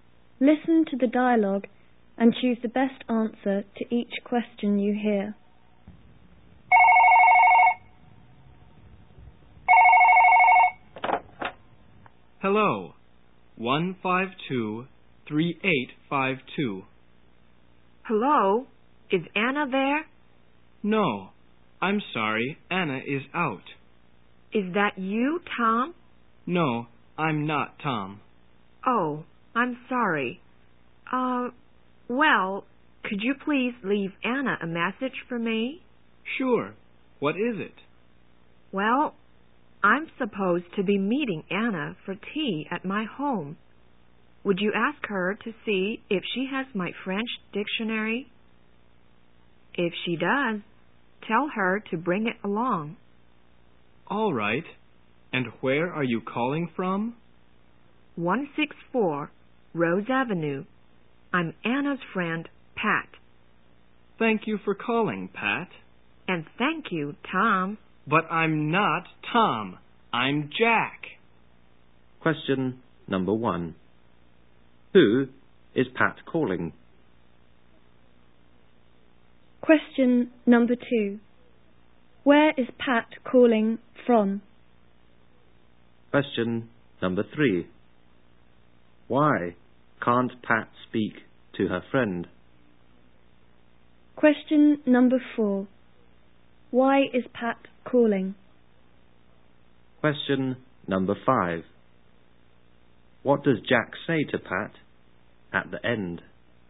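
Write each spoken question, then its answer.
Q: Who is Pat calling?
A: Anna

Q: Where is Pat calling from?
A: 164 Rose Avenue

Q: Why can't Pat speak to her friend?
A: Anna is out

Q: Why is Pat calling?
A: To ask Anna to bring her French dictionary to tea

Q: What does Jack say to Pat at the end?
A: That he is not Tom, he is Jack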